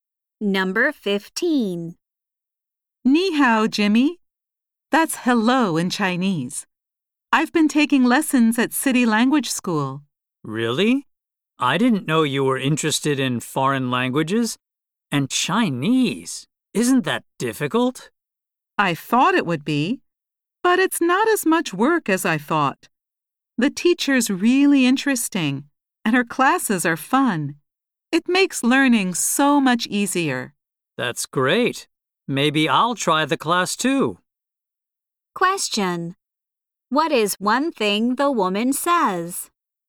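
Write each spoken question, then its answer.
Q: What is one thing the woman says?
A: Learning Chinese is easier than she expected.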